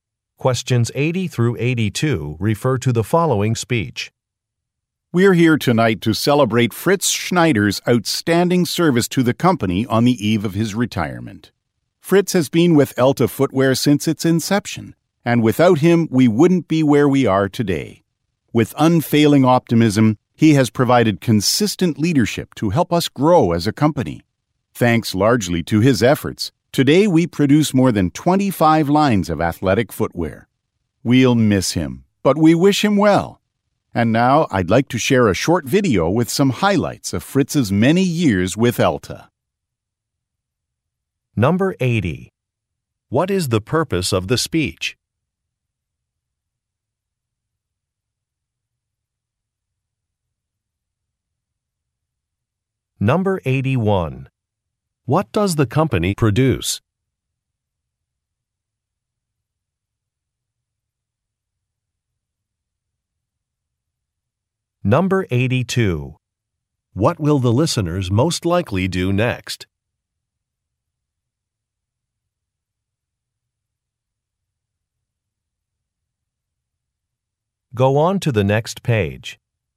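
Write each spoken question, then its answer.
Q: What is the purpose of the speech?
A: To celebrate a colleague's retirement

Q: What does the company produce?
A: Athletic footwear

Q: What will the listeners most likely do next?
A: Watch a video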